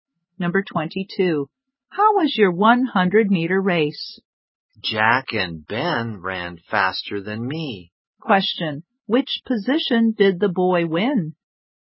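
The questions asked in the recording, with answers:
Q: Which position did the boy win?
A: Third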